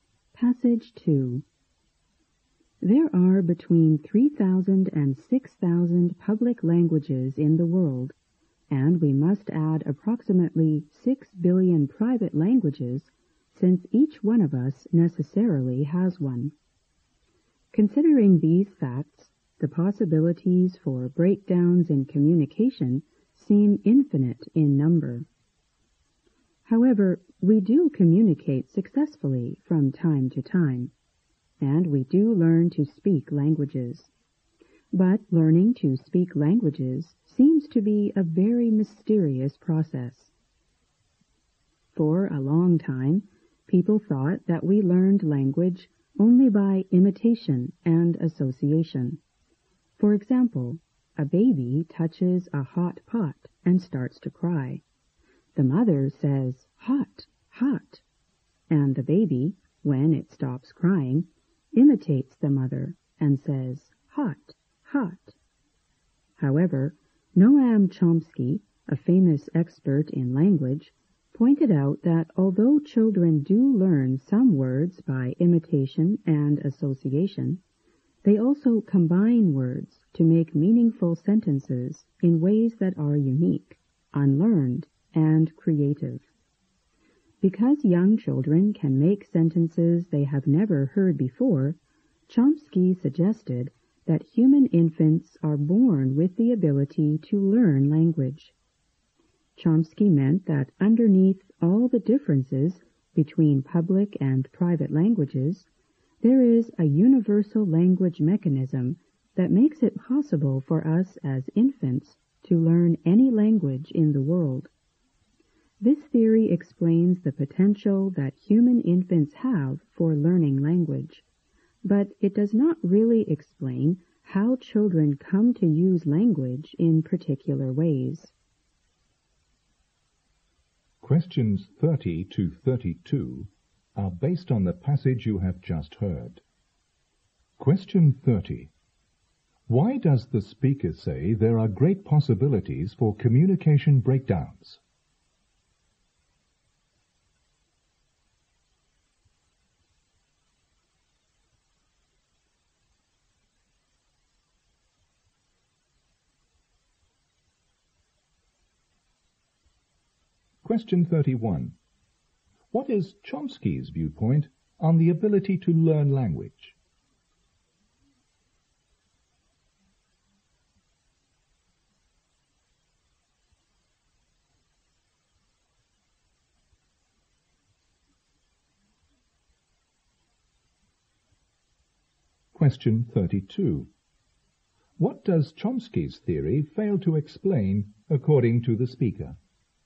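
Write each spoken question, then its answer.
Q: Why does the speaker say there are great possibilities for communication breakdowns?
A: There are thousands of public languages plus a private language for every person.

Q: What is Chomsky's viewpoint on the ability to learn language?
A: Humans are born with the ability to learn language.

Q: What does Chomsky's theory fail to explain according to the speaker?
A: How children come to use language in particular ways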